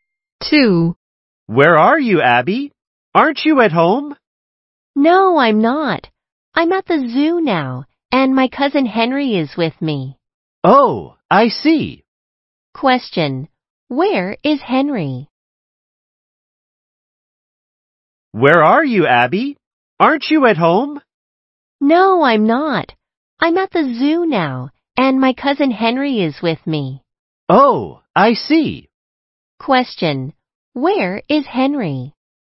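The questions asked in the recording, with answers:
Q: Where is Henry?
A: At the zoo.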